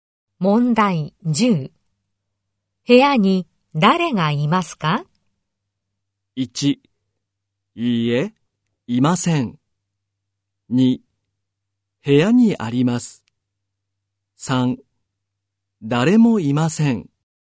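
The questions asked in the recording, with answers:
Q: 部屋に誰がいますか?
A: 3: 誰もいません。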